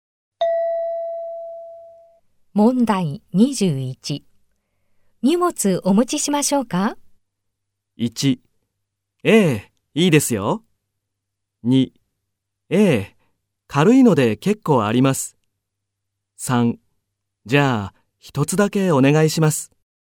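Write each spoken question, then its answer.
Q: 荷物お持ちしましょうか?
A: 3: じゃあ、一つだけお願いします。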